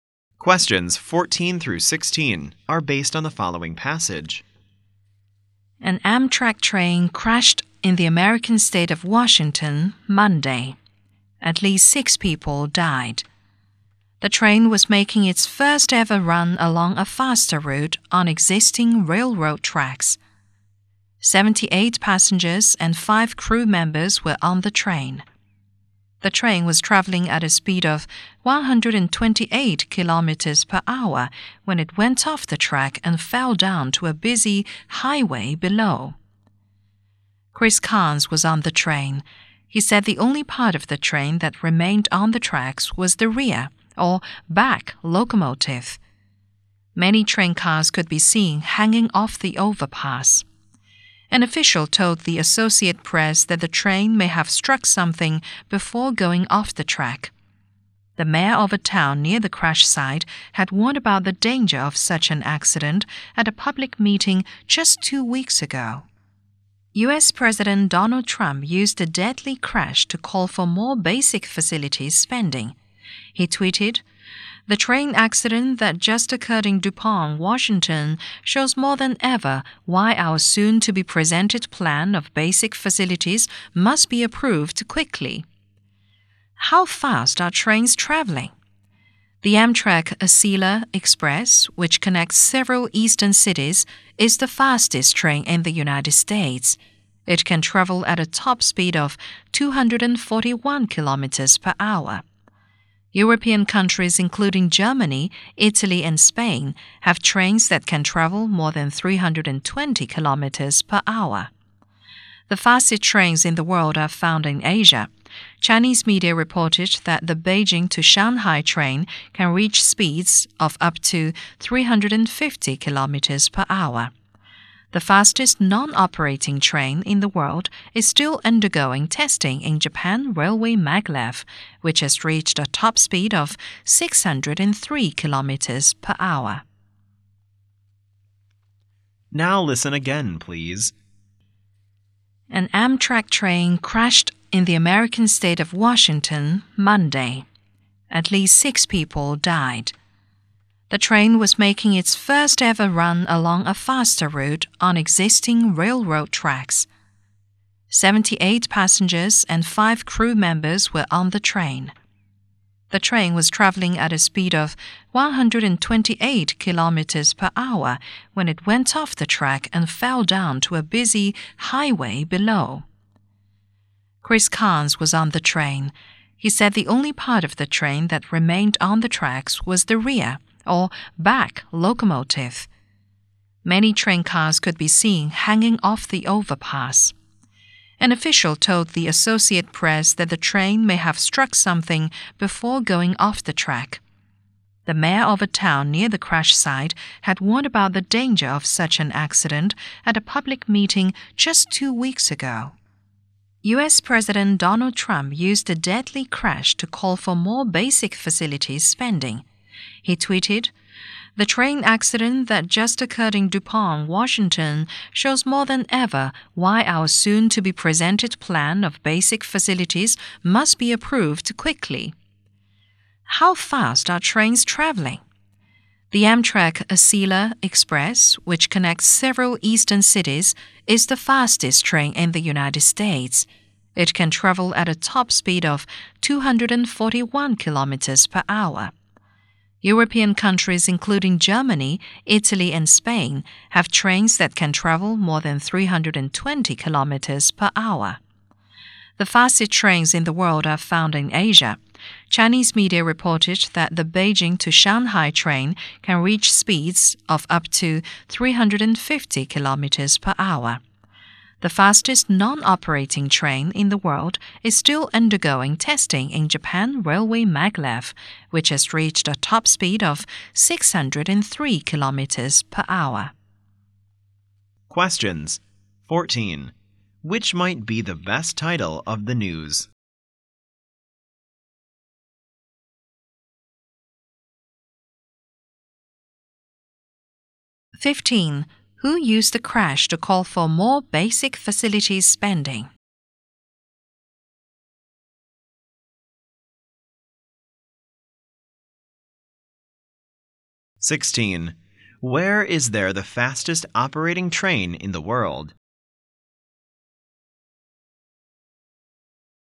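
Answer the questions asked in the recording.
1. U.S. President Donald Trump
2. In Asia, in China (the Beijing to Shanghai train)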